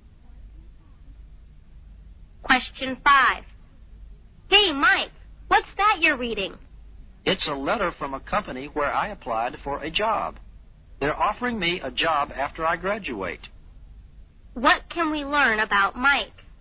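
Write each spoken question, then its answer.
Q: What can we learn about Mike?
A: He has been offered a job after he graduates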